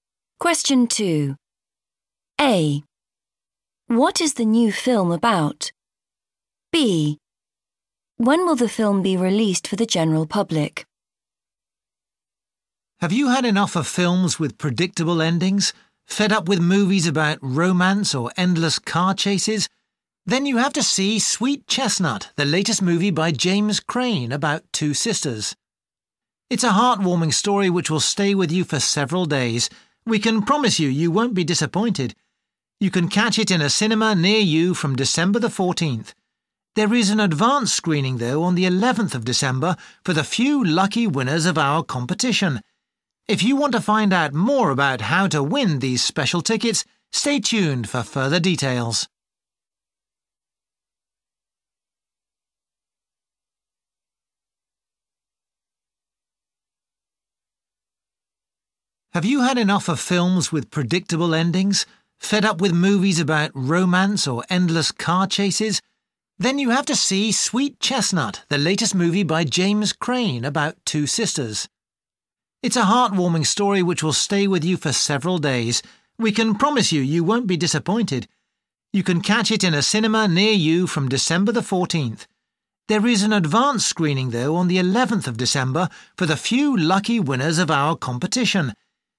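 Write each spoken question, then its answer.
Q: What is the new film about?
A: Two sisters

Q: When will the film be released for the general public?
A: December the 14th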